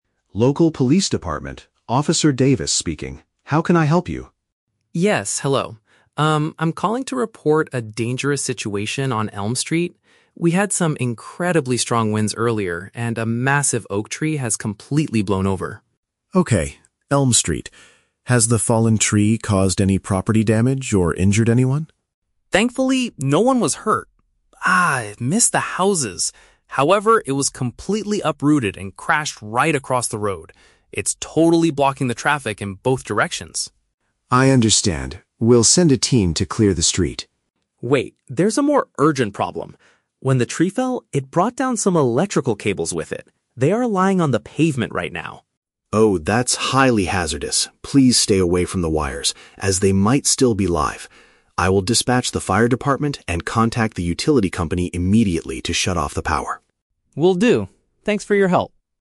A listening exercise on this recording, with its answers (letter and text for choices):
Listen to a telephone conversation between a citizen and a police officer, and choose the correct answer (A, B, or C) for each question.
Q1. Why is the man calling the police department?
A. To report an old tree that crashed into a residential house.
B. To complain about a heavy traffic jam on his way to work.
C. To inform them about a large plant obstructing the street.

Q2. What additional danger occurred when the tree fell?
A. It snapped power lines which are now resting on the ground.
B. It caused severe injuries to people walking on the pavement.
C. It heavily damaged several cars parked along the street.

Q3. What does the officer instruct the man to do?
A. Call the local utility company to turn off the electricity.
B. Keep a safe distance from the fallen electrical lines.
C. Try to move the heavy branches off the road quickly.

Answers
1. C. To inform them about a large plant obstructing the street.
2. A. It snapped power lines which are now resting on the ground.
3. B. Keep a safe distance from the fallen electrical lines.

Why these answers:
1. Mark reports that a "massive oak tree" (a large plant) has "blown over" and is "totally blocking the traffic" (obstructing the street).
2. Mark says the tree "brought down some electrical cables" and they are "lying on the pavement". "Snapped power lines" is a paraphrase for bringing down electrical cables, and "resting on the ground" means lying on the pavement.
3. Officer Davis tells Mark, "Please stay away from the wires". "Keep a safe distance" is a direct paraphrase of stay away, and "electrical lines" means wires.

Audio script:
Officer Davis: Local Police Department, Officer Davis speaking. How can I help you?
Mark: Yes, hello. Um, I'm calling to report a dangerous situation on Elm Street. We had some incredibly strong winds earlier, and a massive oak tree has completely blown over.
Officer Davis: Okay, Elm Street. Has the fallen tree caused any property damage or injured anyone?
Mark: Thankfully, no one was hurt. Ah, it missed the houses. However, it was completely uprooted and crashed right across the road. It's totally blocking the traffic in both directions.
Officer Davis: I understand. We'll send a team to clear the street.
Mark: Wait, there's a more urgent problem. When the tree fell, it brought down some electrical cables with it. They are lying on the pavement right now.
Officer Davis: Oh, that's highly hazardous. Please stay away from the wires, as they might still be live. I will dispatch the fire department and contact the utility company immediately to shut off the power.
Mark: Will do. Thanks for your help.